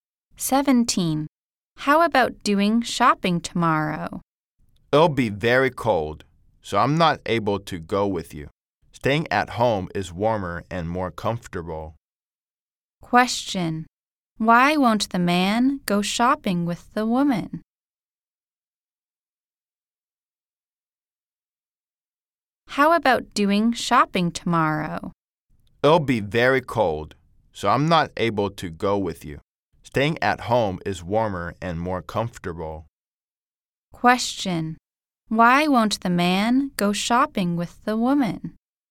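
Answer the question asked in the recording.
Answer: It will be very cold tomorrow.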